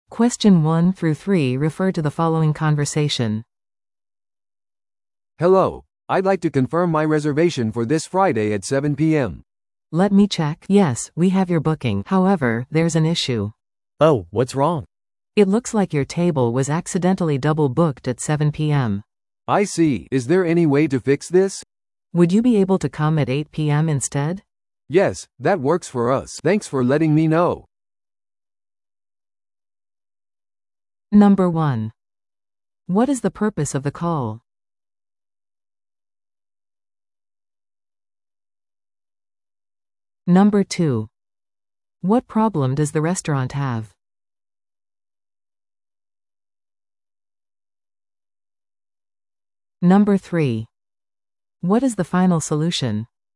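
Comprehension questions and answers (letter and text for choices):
Listen to the audio below and answer the questions.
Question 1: What is the purpose of the call?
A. 2名の予約をするため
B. 予約を確認するため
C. メニューの変更を依頼するため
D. 予約をキャンセルするため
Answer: B. 予約を確認するため

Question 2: What problem does the restaurant have?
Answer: The table was double booked at 7 p.m.

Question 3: What is the final solution?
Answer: The customer will come at 8 p.m. instead.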